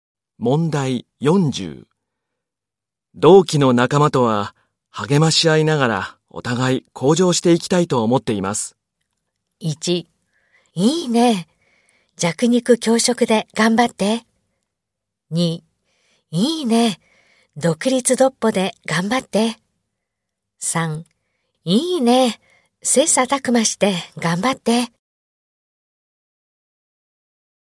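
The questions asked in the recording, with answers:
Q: 同期の仲間とは励まし合いながらお互い向上していきたいと思っています。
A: 3: いいね、切磋琢磨して頑張って。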